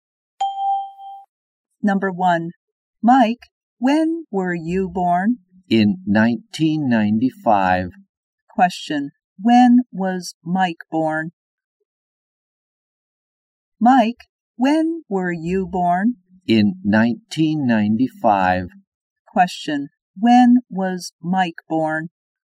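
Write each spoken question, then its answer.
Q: When was Mike born?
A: In 1995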